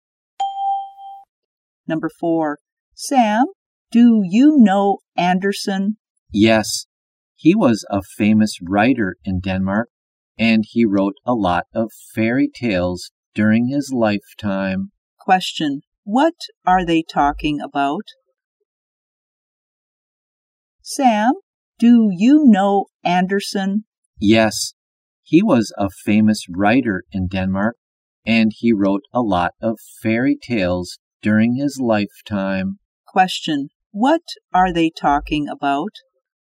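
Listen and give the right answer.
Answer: Andersen, a famous writer of fairy tales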